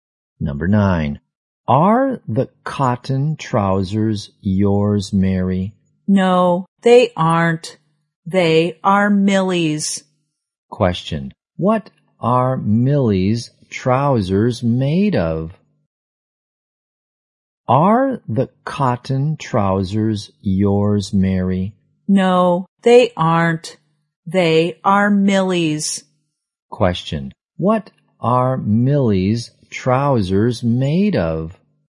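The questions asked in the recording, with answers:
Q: What are Millie's trousers made of?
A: Cotton.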